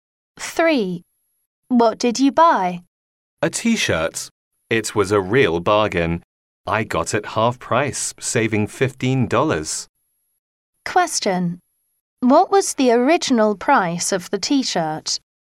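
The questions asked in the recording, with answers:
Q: What was the original price of the t-shirt?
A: $30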